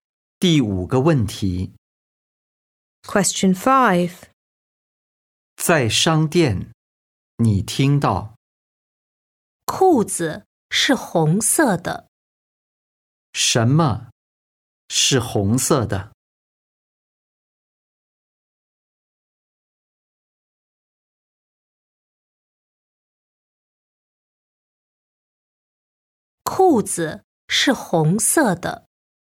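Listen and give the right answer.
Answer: 裤子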